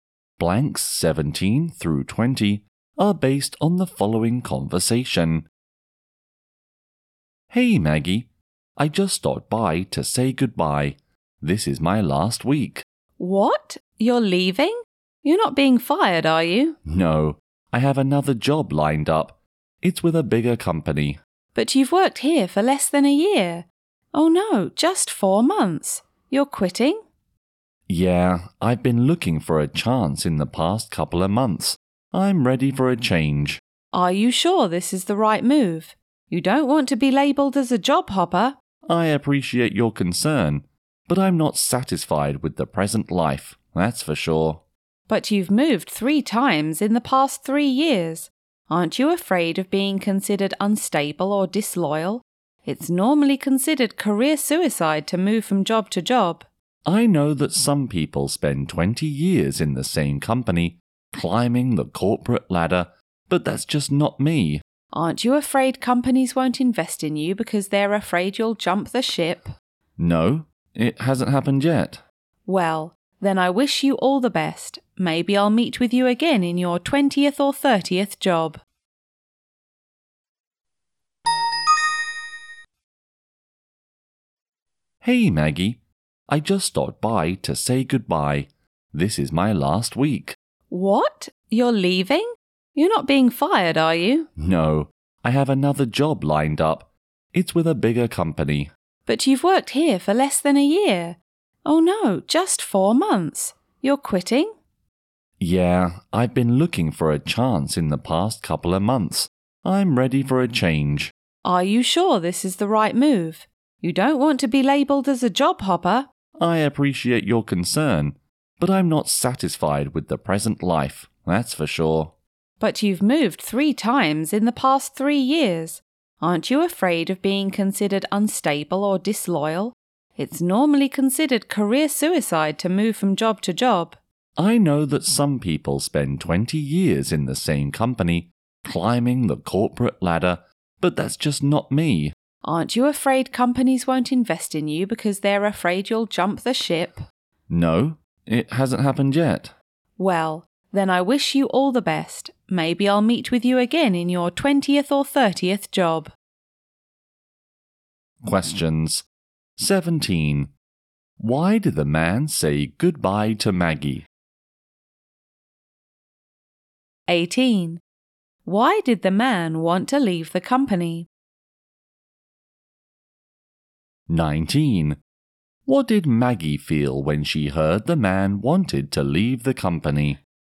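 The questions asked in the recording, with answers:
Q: Why did the man say goodbye to Maggie?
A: He is leaving for a job at another company.

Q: Why did the man want to leave the company?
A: He was not satisfied and wanted a change.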